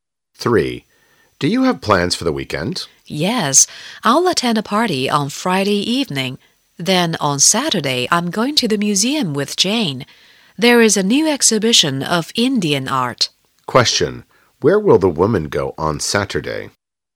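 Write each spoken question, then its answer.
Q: Where will the woman go on Saturday?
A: To the museum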